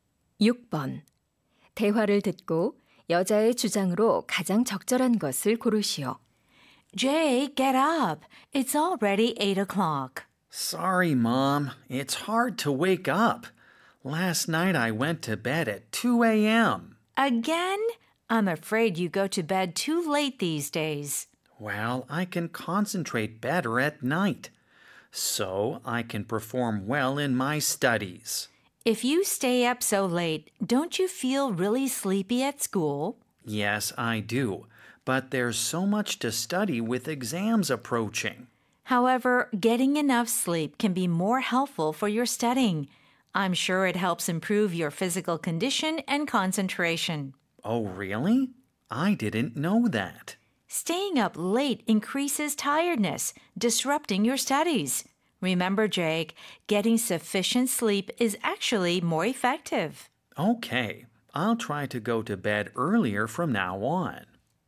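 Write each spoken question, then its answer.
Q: 대화를 듣고 여자의 주장으로 가장 적절한 것을 고르시오.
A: 충분한 수면이 공부에 더 효과적이다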